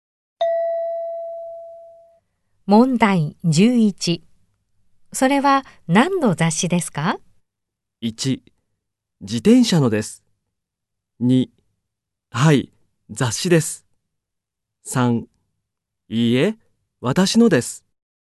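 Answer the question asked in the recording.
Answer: 1: 自転車のです。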